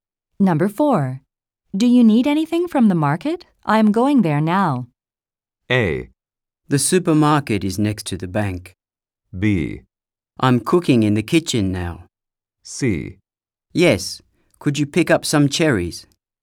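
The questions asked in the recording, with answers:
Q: Do you need anything from the market?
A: C: Yes, could you pick up some cherries?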